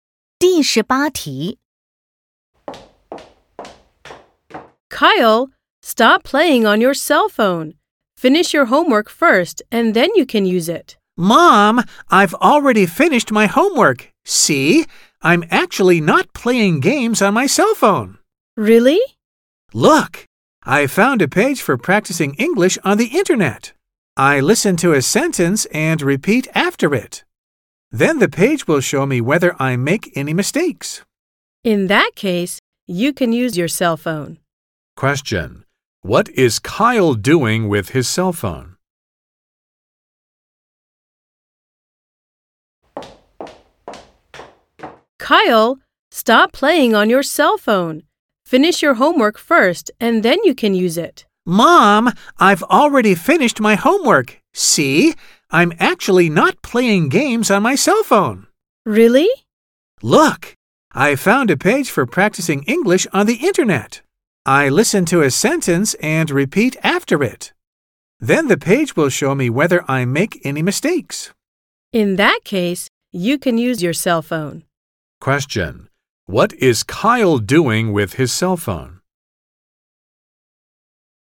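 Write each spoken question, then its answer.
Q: What is Kyle doing with his cell phone?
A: Practicing English on a web page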